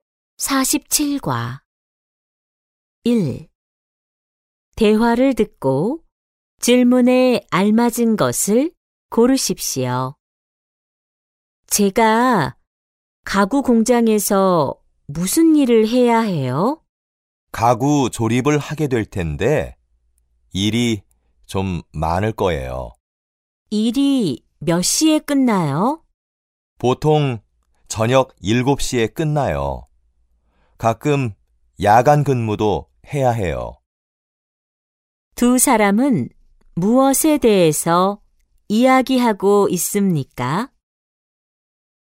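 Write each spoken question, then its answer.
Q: 두 사람은 무엇에 대해서 이야기하고 있습니까?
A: 가구 공장에서 할 일과 근무 시간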